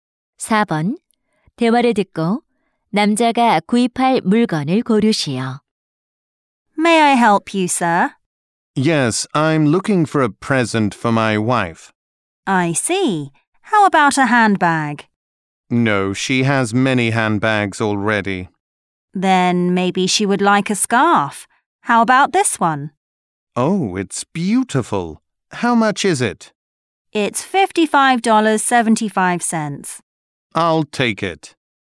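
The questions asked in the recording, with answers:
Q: 대화를 듣고 남자가 구입할 물건을 고르시오.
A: 스카프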